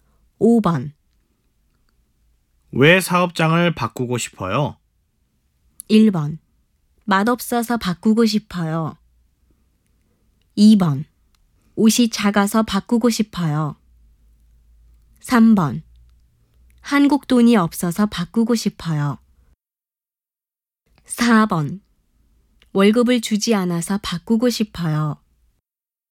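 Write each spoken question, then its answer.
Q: 왜 사업장을 바꾸고 싶어요?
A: 4: 월급을 주지 않아서 바꾸고 싶어요.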